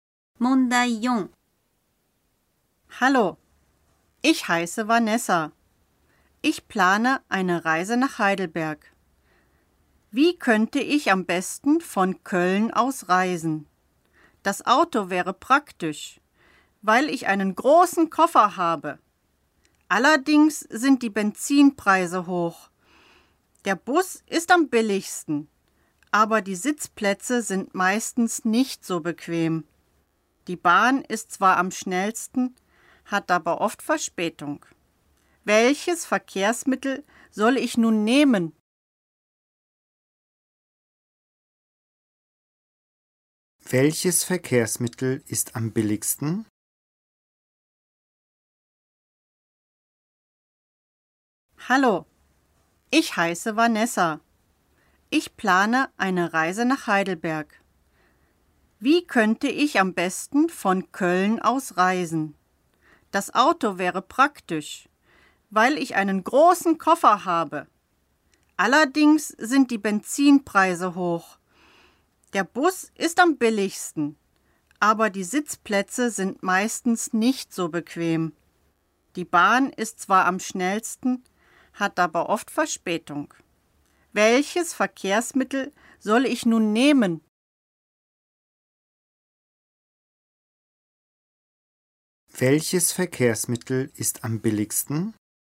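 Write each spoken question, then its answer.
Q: Welches Verkehrsmittel ist am billigsten?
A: Der Bus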